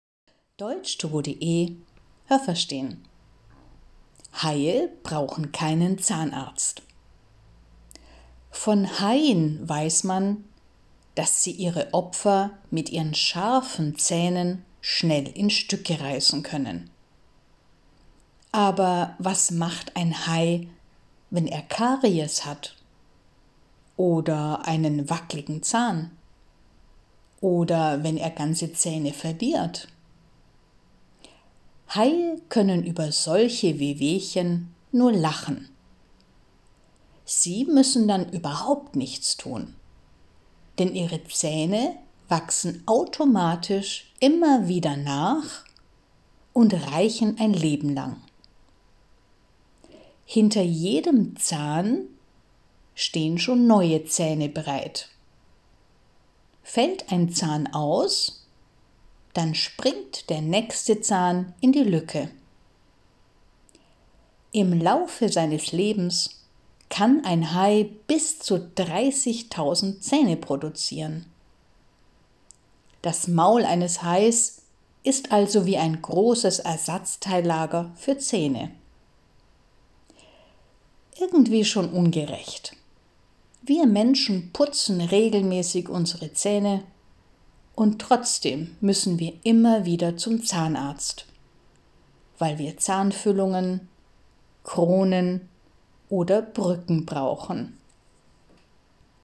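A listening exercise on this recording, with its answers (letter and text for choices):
Was haben Sie gehört? Es gibt nur eine korrekte Antwort.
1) Haie haben _____ Zähne.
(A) scharfe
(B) alte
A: (A) scharfe

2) Haie verlieren _____ Zähne.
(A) nie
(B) auch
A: (B) auch

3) Wenn Haie einen Zahn verlieren, ...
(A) dann tut ihnen das sehr weh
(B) dann haben sie keine Probleme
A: (B) dann haben sie keine Probleme

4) Die Zähne des Hais ...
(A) wachsen automatisch nach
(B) reichen nur sieben Jahre lang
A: (A) wachsen automatisch nach

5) _____ jedem Zahn steht ein neuer Zahn bereit.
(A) Zwischen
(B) Hinter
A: (B) Hinter

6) Ein Hai kann in seinem Leben bis zu _____ Zähne produzieren.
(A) 13.000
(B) 30.000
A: (B) 30.000

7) Menschen, die regelmäßig Zähne putzen, müssen _____ zum Zahnarzt.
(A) nie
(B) trotzdem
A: (B) trotzdem

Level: A2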